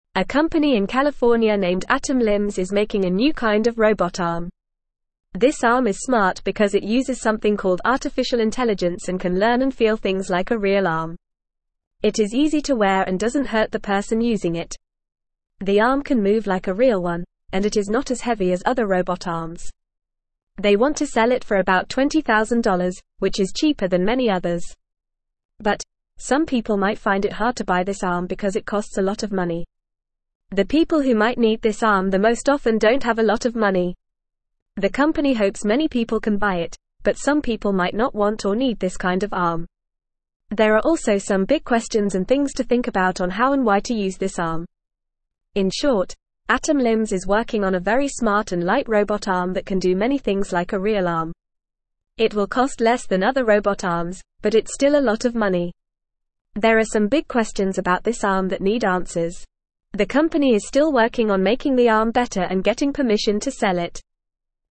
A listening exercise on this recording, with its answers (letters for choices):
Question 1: What is Atom Limbs making?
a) A new kind of robot arm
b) A new kind of computer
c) A new kind of car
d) A new kind of phone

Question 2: What makes the robot arm smart?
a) Super strength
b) Artificial intelligence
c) Fast speed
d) Bright colors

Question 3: How does the robot arm feel?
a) Like a rock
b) Like a feather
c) Like a real arm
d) Like a toy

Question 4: How much does Atom Limbs want to sell the arm for?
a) About $10,000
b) About $5,000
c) About $20,000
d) About $50,000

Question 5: Why might some people find it hard to buy the arm?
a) Because it is too heavy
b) Because it is too big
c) Because it is too slow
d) Because it costs a lot of money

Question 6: Who might need the arm the most?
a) People who don't have a lot of money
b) People who have a lot of money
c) People who don't have arms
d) People who don't like robots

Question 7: What are some big questions about the arm?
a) What color it should be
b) How and why to use it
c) How fast it can move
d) How much it weighs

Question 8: What is Atom Limbs still working on?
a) Making a new kind of computer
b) Making a new kind of car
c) Making a new kind of phone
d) Making the arm better and getting permission to sell it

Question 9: A company in California named Atom (1)______ is making a new kind of robot arm.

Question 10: This arm is smart because it uses something called artificial (2)______ and can learn and feel things like a real arm.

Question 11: It is easy to wear and doesn't hurt the (3)______ using it.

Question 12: The arm can move like a real one, and it is not as (4)______ as (5)______ robot (6)______.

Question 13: The arm can move like a real one, and it is not as (4)______ as (5)______ robot (6)______.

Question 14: The arm can move like a real one, and it is not as (4)______ as (5)______ robot (6)______.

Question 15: There are also some big questions and (8)______ to (9)______ about on how and why to use this arm.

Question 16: There are also some big questions and (8)______ to (9)______ about on how and why to use this arm.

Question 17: In short, Atom Limbs is working on a very smart and light robot arm that can do (10)______ things like a (11)______ arm.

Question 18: In short, Atom Limbs is working on a very smart and light robot arm that can do (10)______ things like a (11)______ arm.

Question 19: There are some big questions about this arm that (12)______ answers.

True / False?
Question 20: The company wants to sell the arm for around $30,000, which is more expensive than many other robot arms.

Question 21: It can move just like a real arm and is not as heavy as other robot arms.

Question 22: Some people might find it easy to buy this arm because it is affordable.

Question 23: This robot arm does not use artificial intelligence and cannot learn and feel things like a real arm.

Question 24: The people who might need this arm the most often have a lot of money.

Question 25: Atom Limbs is still working on improving the arm and getting permission to sell it.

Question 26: Atom Limbs, a company in California, is creating a new type of robot arm.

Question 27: The arm is easy to wear and does not cause any pain to the person using it.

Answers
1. a
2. b
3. c
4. c
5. d
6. a
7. b
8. d
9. Limbs
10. intelligence
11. person
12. heavy
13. other
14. arms
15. things
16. think
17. many
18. real
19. need
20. False
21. True
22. False
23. False
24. False
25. True
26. True
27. True

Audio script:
A company in California named Atom Limbs is making a new kind of robot arm. This arm is smart because it uses something called artificial intelligence and can learn and feel things like a real arm. It is easy to wear and doesn't hurt the person using it. The arm can move like a real one, and it is not as heavy as other robot arms. They want to sell it for about $20,000, which is cheaper than many others.
But, some people might find it hard to buy this arm because it costs a lot of money. The people who might need this arm the most often don't have a lot of money. The company hopes many people can buy it, but some people might not want or need this kind of arm. There are also some big questions and things to think about on how and why to use this arm.
In short, Atom Limbs is working on a very smart and light robot arm that can do many things like a real arm. It will cost less than other robot arms, but it's still a lot of money. There are some big questions about this arm that need answers. The company is still working on making the arm better and getting permission to sell it.